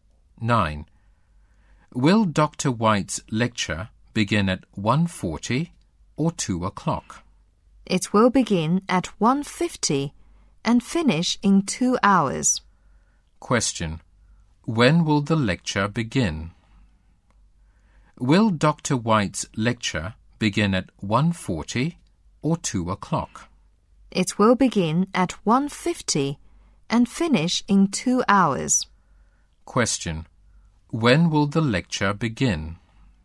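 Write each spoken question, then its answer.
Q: When will the lecture begin?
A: At 1:50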